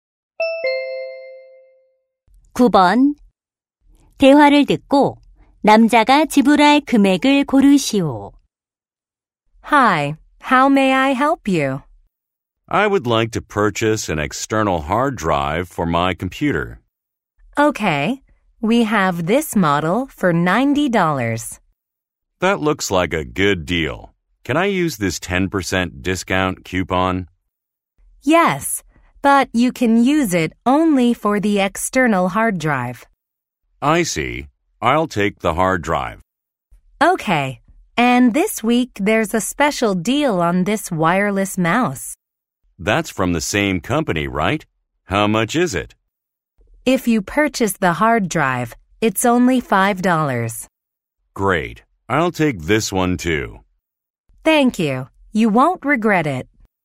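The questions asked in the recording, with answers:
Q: 대화를 듣고 남자가 지불할 금액을 고르시오.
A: $86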